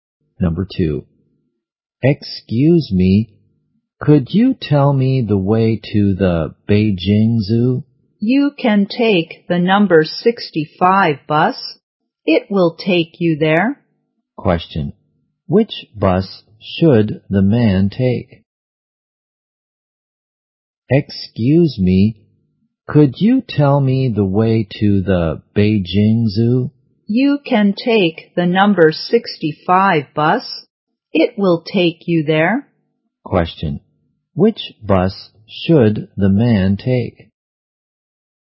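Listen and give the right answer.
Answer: The number 65 bus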